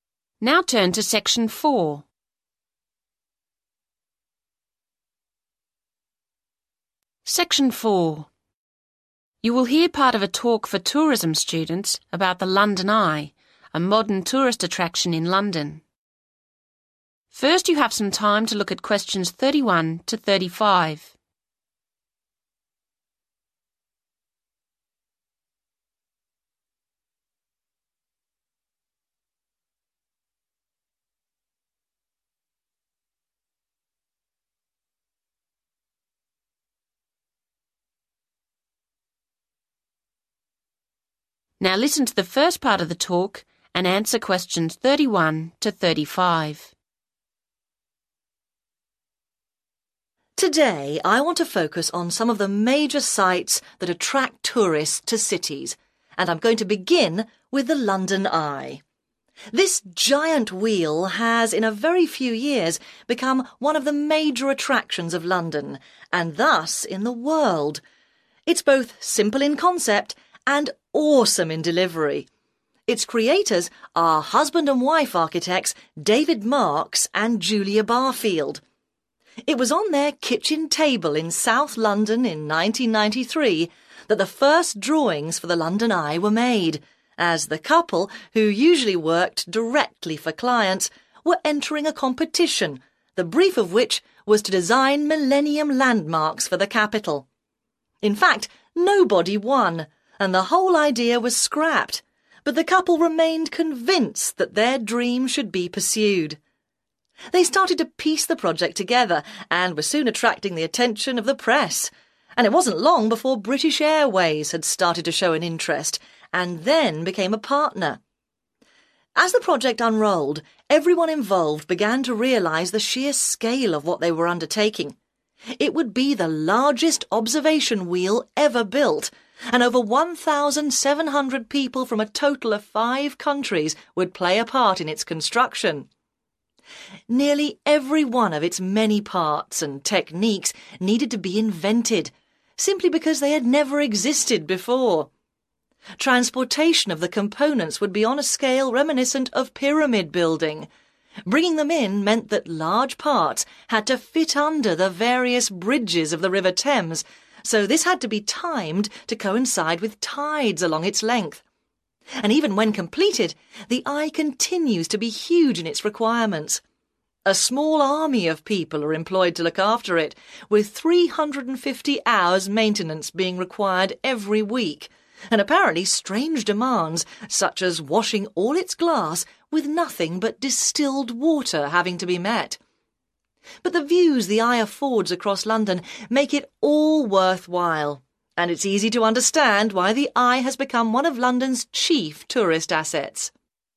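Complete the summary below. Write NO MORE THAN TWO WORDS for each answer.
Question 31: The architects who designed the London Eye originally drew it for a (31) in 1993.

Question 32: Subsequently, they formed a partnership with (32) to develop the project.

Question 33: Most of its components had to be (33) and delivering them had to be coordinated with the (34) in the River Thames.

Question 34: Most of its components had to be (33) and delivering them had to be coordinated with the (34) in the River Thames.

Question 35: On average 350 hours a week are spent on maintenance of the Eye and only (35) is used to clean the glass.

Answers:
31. competition
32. British Airways
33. invented
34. tides
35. distilled water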